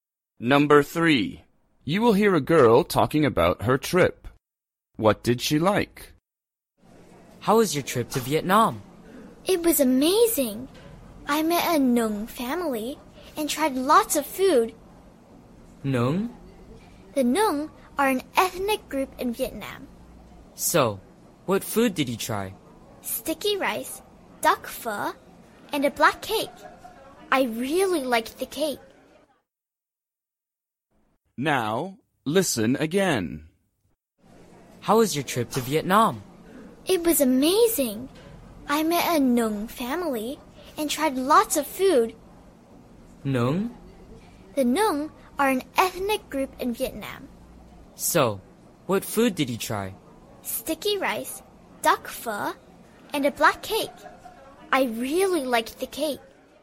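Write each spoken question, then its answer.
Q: What did she like?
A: The black cake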